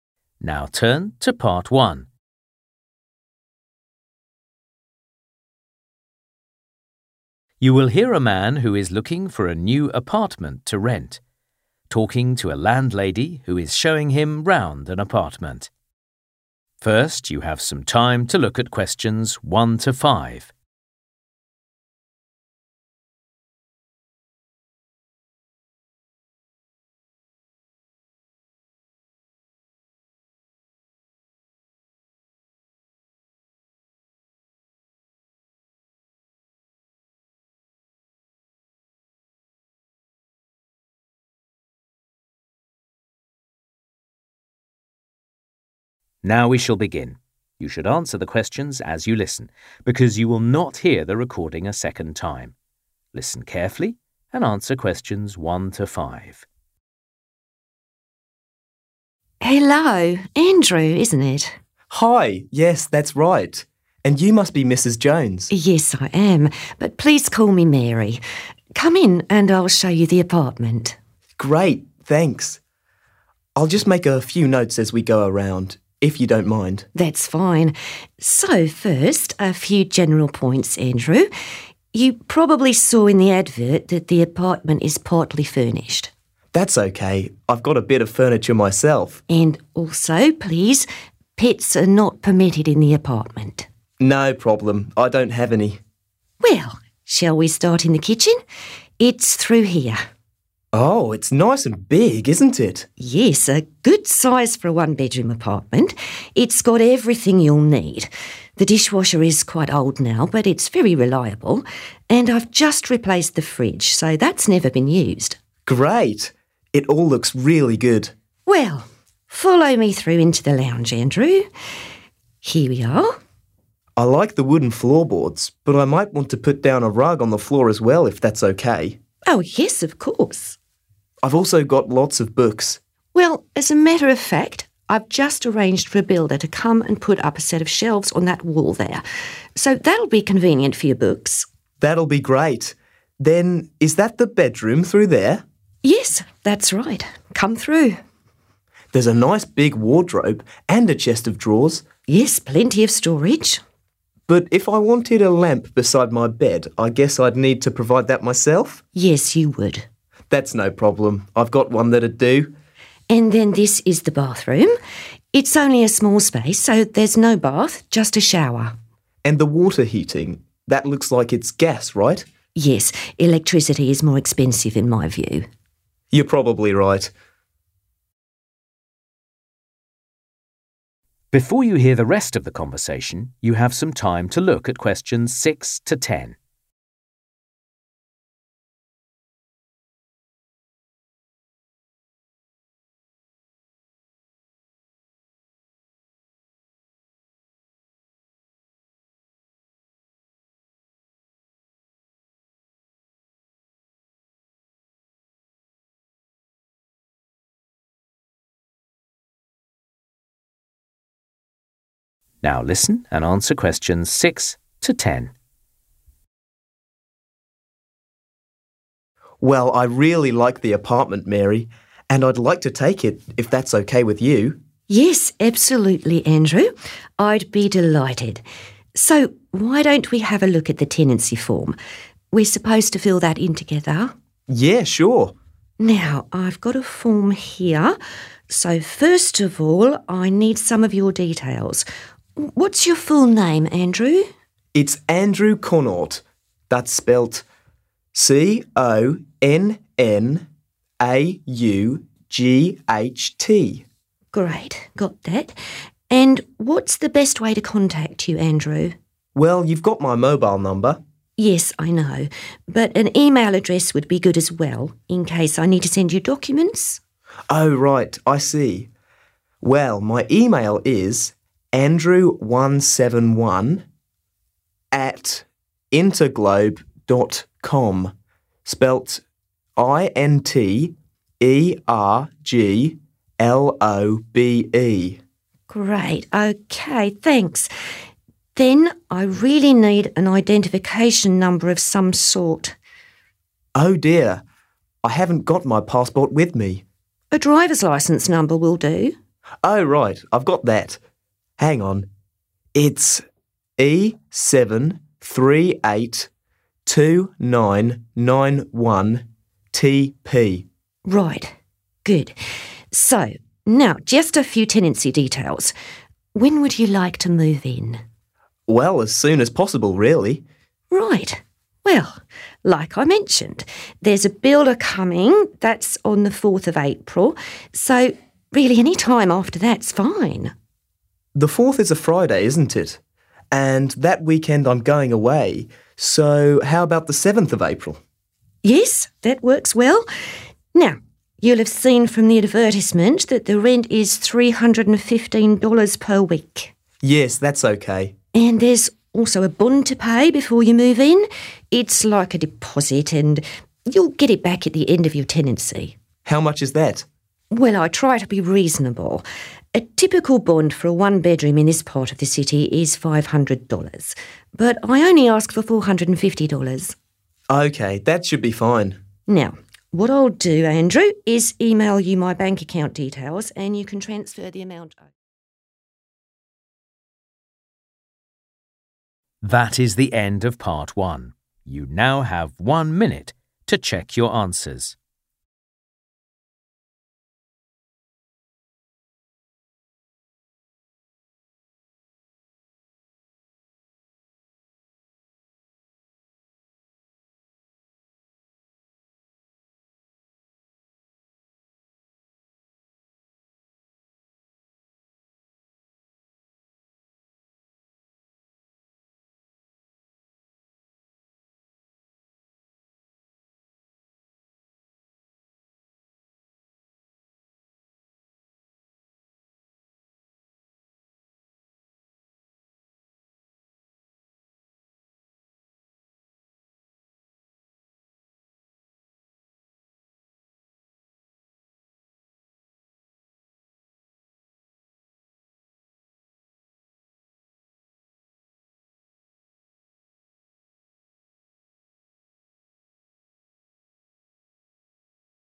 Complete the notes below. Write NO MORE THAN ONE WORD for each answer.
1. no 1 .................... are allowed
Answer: pets

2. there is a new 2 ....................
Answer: fridge

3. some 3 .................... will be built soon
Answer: shelves

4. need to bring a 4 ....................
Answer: lamp

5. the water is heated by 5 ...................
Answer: gas

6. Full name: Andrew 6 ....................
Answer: Connaught

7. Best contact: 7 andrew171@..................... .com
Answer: interglobe

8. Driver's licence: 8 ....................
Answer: E 738 2991 TP

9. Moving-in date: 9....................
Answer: 7/7th April

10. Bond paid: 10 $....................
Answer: 450

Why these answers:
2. Mary has 'just replaced' the fridge and it has 'never been used', so it must be 'new'. Distraction The dishwasher is old but still reliable, so it cannot be the 'new' item.
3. Mary says she has arranged for a builder to come in and 'put up' a set of shelves; put up = make or build in this context. Distraction Andrew says he will bring a rug for the floor, but a rug isn't 'built'.
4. Andrew asks if he would need to provide his own lamp and Mary replies that he would. Distraction Andrew comments that there is a wardrobe and a chest of drawers, so he would not need to 'bring' either of those himself.
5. Andrew asks if the water is heated by gas and Mary replies that it is. Distraction Electricity is mentioned, but Mary says it is too expensive.
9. Distraction Mary mentions that a builder is coming on 4 April.
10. Distraction Mary says that a typical bond is $500, but she only asks for $450.